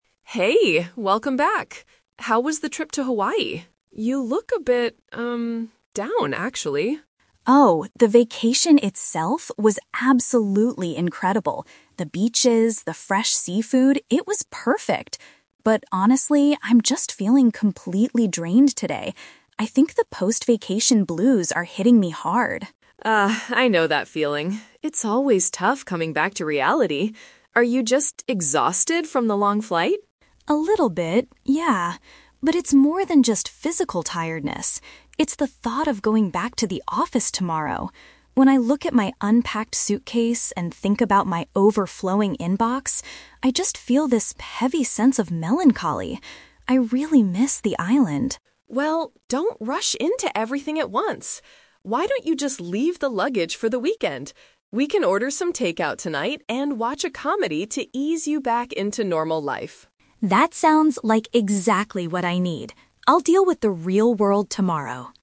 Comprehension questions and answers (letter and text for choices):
Listen to the conversation between two roommates and choose the correct answer (A, B, or C) for each question.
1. What is Sarah's main problem right now?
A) She is feeling sad about returning to her daily life.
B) She is physically exhausted from traveling all day.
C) She is upset because her vacation was too short.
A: A) She is feeling sad about returning to her daily life.

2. According to the conversation, what makes Sarah feel a sense of "melancholy"?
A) The physical fatigue from her long flight.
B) The lack of fresh seafood in her city.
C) The thought of resuming her work responsibilities.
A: C) The thought of resuming her work responsibilities.

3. What is Emma's advice for tonight?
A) To finish unpacking her bags as quickly as possible.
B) To relax at home with some food and a movie.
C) To go to sleep early so she can wake up fresh for work.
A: B) To relax at home with some food and a movie.

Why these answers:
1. Sarah mentions having "post-vacation blues" and says it's "tough coming back to reality." This is a paraphrase of feeling sad about returning to daily life. The Trap (B): Emma asks if she is exhausted from the flight, but Sarah says "it's more than just physical tiredness," meaning this is not her main problem. The Plausible (C): People often feel this way, but Sarah never mentions that her trip was too short.
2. Sarah says she feels melancholy when she thinks about "going back to the office tomorrow" and her "overflowing inbox." "Work responsibilities" is a synonym for these phrases. The Trap (A): The flight is mentioned earlier in the conversation, but Sarah clearly states her heavy feeling comes from thinking about tomorrow's office work, not the flight itself. The Plausible (B): She mentions enjoying fresh seafood on her trip, so it's logical she might miss it, but it's not the reason for her melancholy.
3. Emma suggests they "order some takeout tonight and watch a comedy." This perfectly matches the idea of relaxing with food and a movie. The Trap (A): The script mentions her luggage/unpacking, but Emma gives the opposite advice: she tells Sarah to "leave the luggage for the weekend." The Plausible (C): Sleeping early is a very common and reasonable way to recover from travel, but Emma never suggests this in the conversation.

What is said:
Emma: Hey, welcome back! How was the trip to Hawaii? You look a bit... um, down, actually.
Sarah: Oh, the vacation itself was absolutely incredible. The beaches, the fresh seafood... it was perfect. But honestly, I'm just feeling completely drained today. I think the post-vacation blues are hitting me hard.
Emma: Ah, I know that feeling. It's always tough coming back to reality. Are you just exhausted from the long flight?
Sarah: A little bit, yeah. But it's more than just physical tiredness. It's the thought of going back to the office tomorrow. When I look at my unpacked suitcase and think about my overflowing inbox, I just feel this heavy sense of melancholy. I really miss the island.
Emma: Well, don't rush into everything at once. Why don't you just leave the luggage for the weekend? We can order some takeout tonight and watch a comedy to ease you back into normal life.